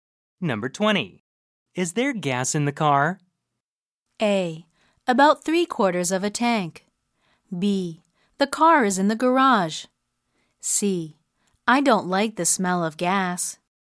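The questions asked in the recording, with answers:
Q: Is there gas in the car?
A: A: About 3/4 of a tank.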